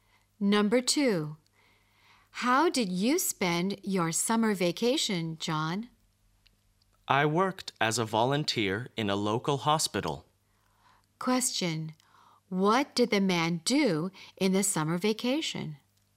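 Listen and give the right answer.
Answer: He worked as a volunteer in a local hospital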